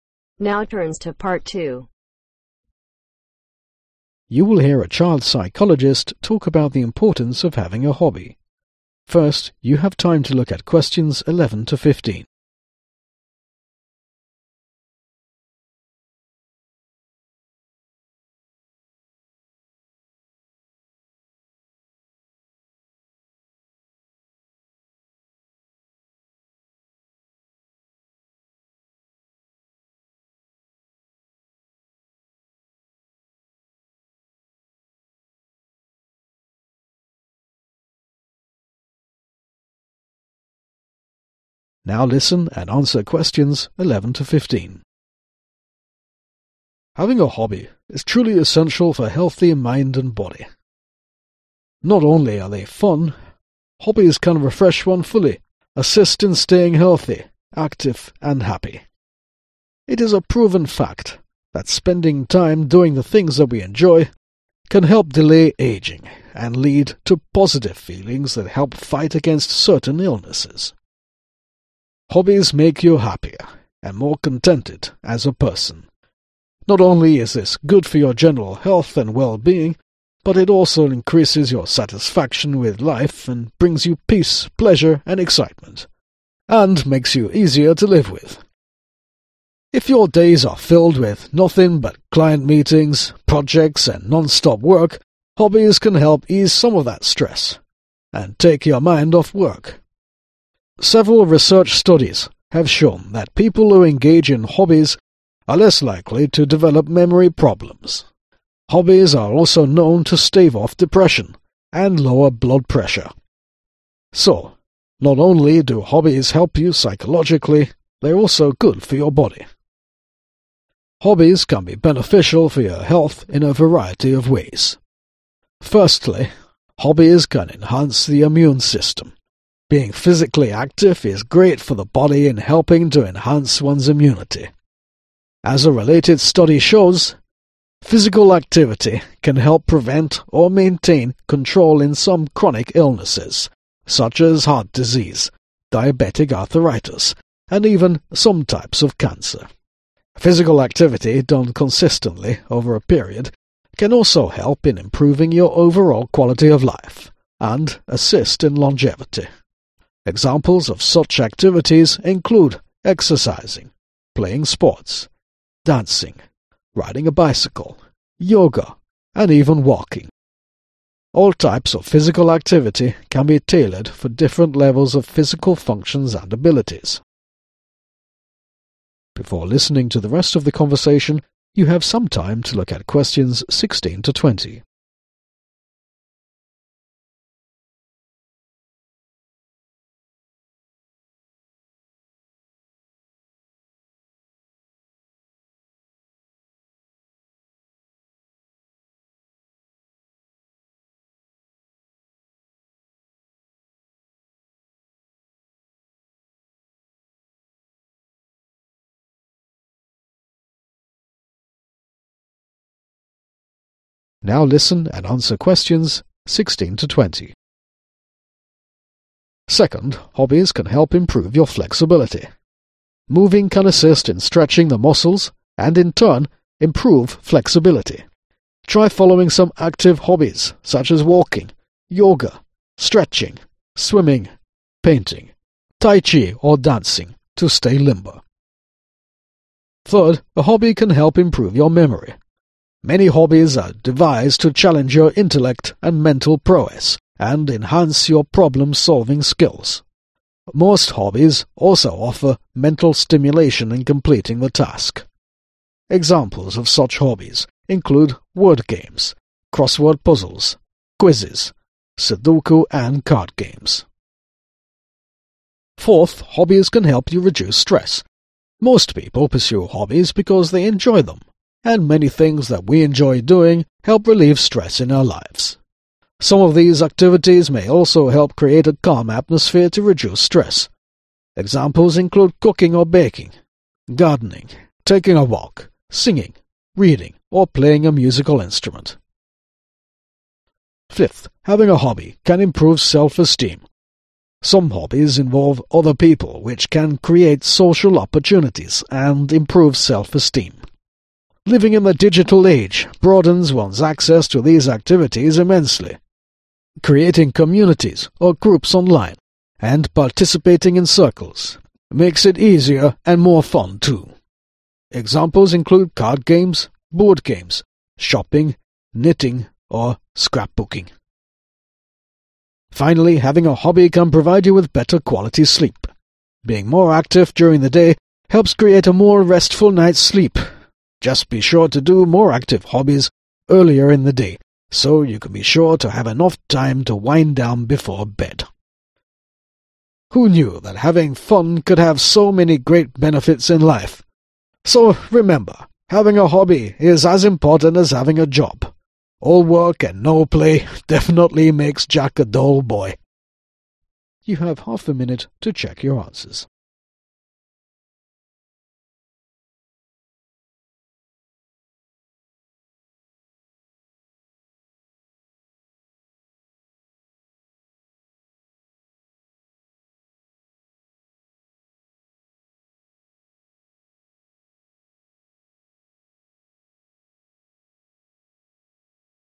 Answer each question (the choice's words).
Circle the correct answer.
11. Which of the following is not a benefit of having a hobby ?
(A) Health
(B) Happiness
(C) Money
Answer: Money

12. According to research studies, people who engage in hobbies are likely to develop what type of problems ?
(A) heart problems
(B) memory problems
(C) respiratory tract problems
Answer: memory problems

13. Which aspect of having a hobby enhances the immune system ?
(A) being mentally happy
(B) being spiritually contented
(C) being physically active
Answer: being physically active

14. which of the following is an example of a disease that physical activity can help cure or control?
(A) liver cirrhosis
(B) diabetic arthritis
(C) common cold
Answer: diabetic arthritis

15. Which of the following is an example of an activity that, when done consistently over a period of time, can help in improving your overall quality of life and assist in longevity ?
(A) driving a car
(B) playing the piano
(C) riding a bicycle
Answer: riding a bicycle

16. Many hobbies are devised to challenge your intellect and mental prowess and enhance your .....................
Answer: PROBLEM SOLVING SKILL

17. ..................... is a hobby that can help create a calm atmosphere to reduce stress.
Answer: GARDENING

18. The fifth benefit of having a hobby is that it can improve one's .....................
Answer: SELF ESTEEM

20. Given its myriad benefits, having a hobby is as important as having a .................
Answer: JOB